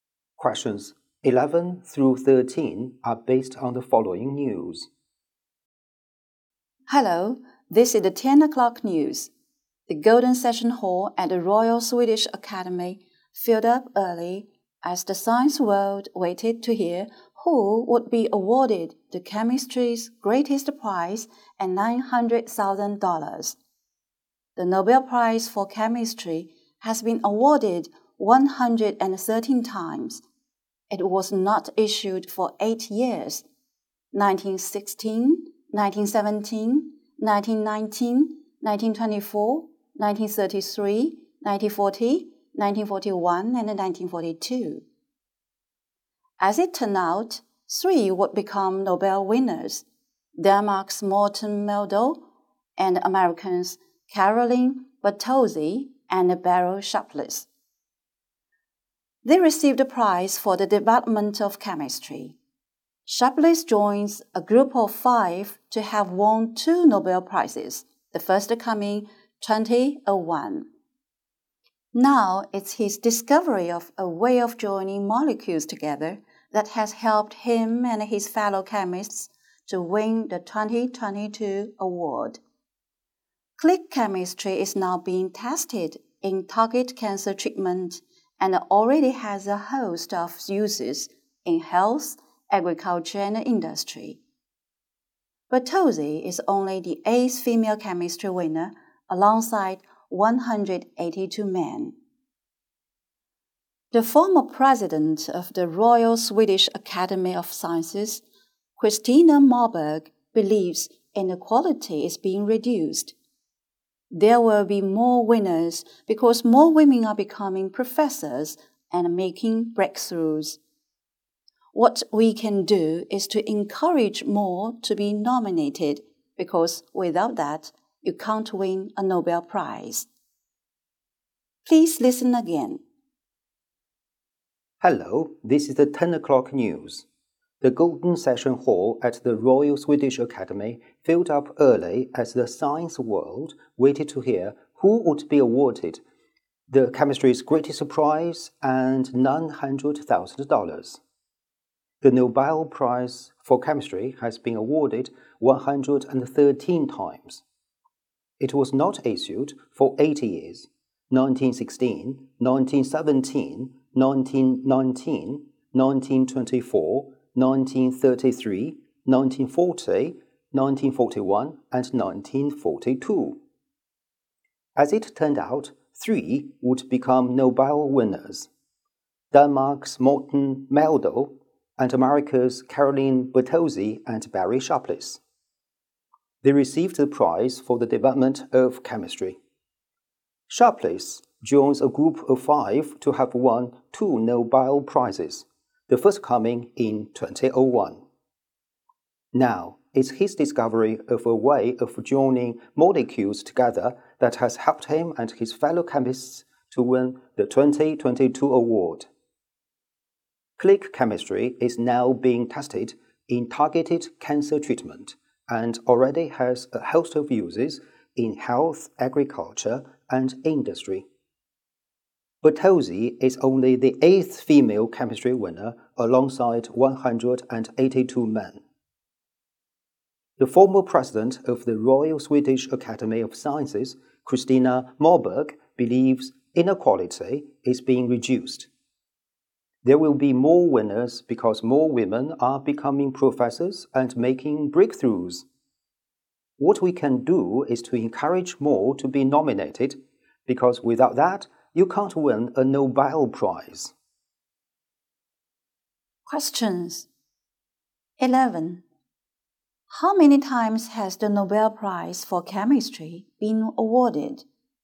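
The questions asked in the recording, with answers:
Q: How many times has the Nobel Prize for Chemistry been awarded?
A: 113 times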